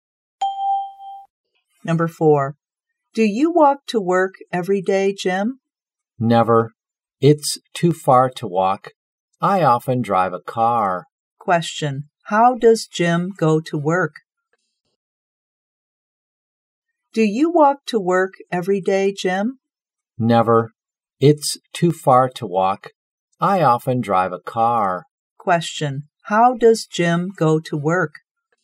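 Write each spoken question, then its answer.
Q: How does Jim go to work?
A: He drives a car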